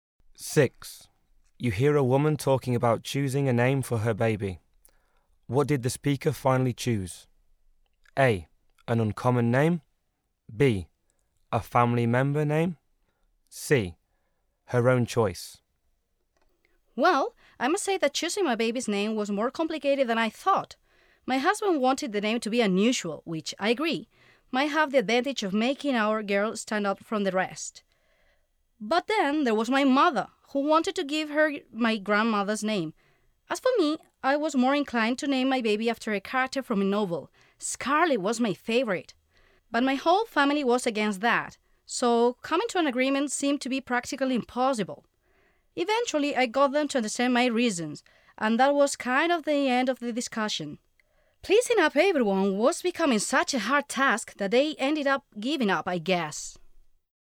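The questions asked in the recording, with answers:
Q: What did the speaker finally choose?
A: C: Her own choice.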